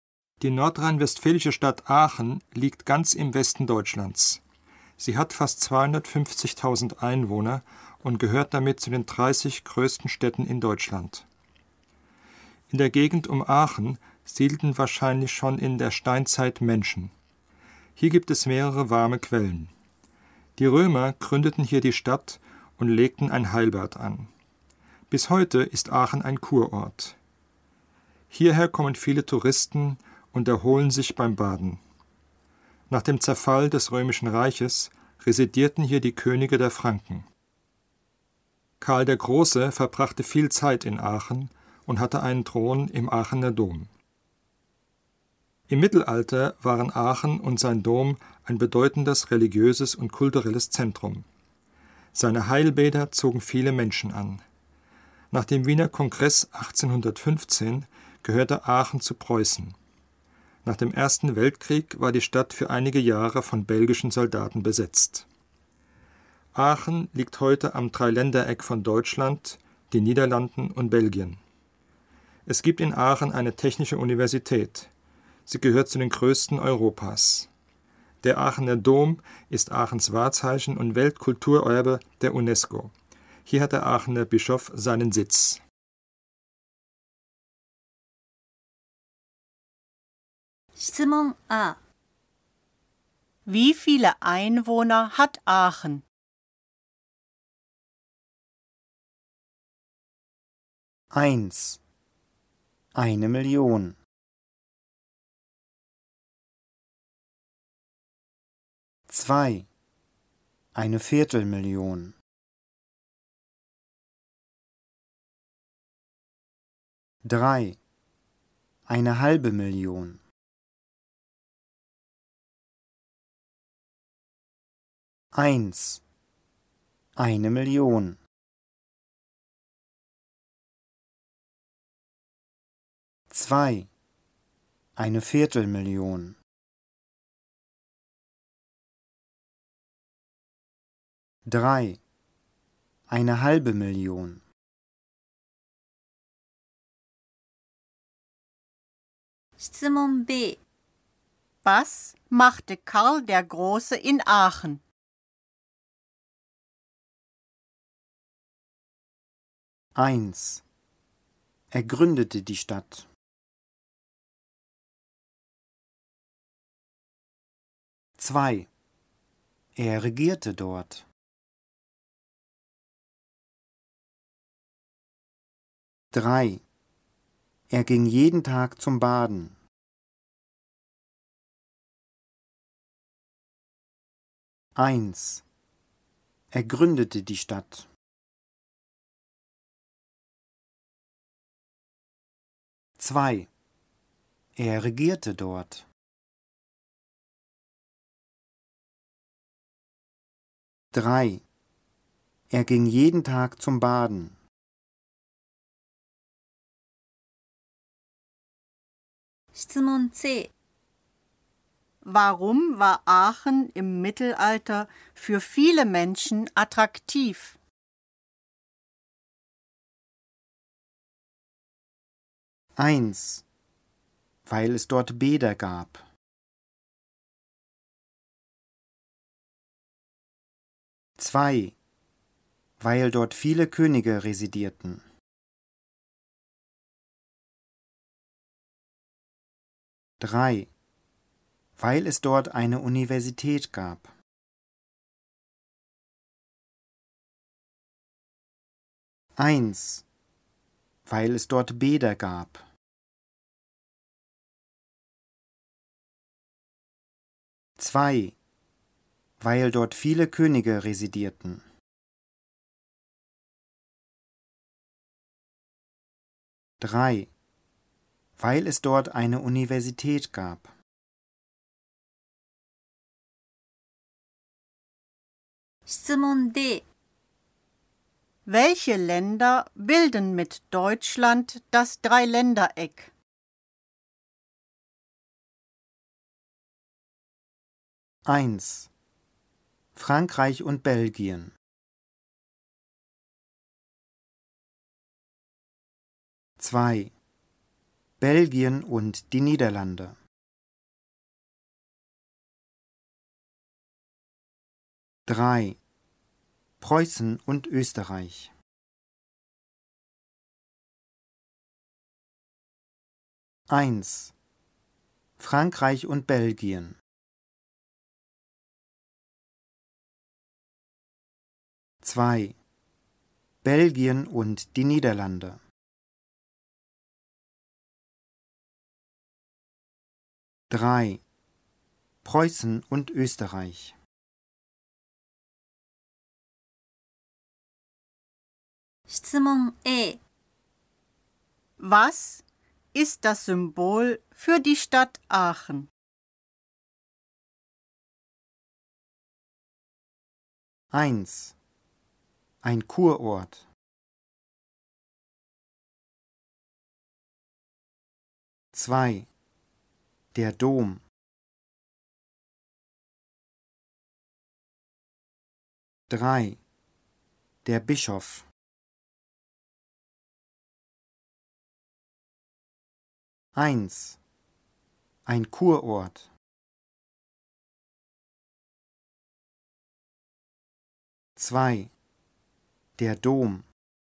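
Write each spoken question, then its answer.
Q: Wie viele Einwohner hat Aachen?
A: 2: 250.000

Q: Was machte Karl der Große in Aachen?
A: 2: Er regierte dort.

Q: Warum war Aachen im Mittelalter für viele Menschen attraktiv?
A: 1: Weil es dort Bäder gab.

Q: Welche Länder bilden mit Deutschland das Dreiländereck?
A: 2: Belgien und die Niederlande.

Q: Was ist das Symbol für die Stadt Aachen?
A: 2: Der Dom.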